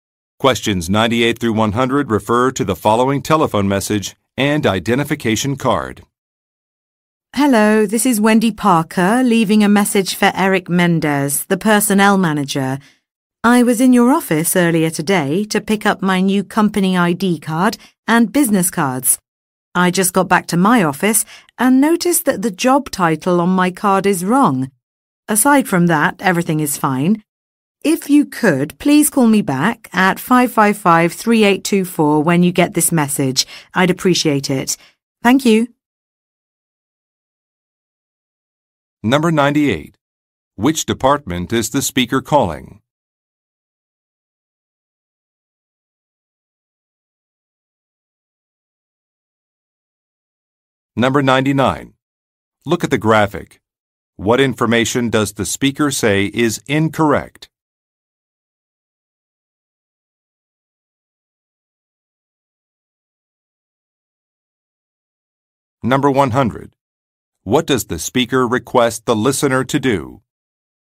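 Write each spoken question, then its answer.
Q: Which department is the speaker calling?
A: Personnel

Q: What does the speaker request the listener to do?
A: Call her back at 555-3824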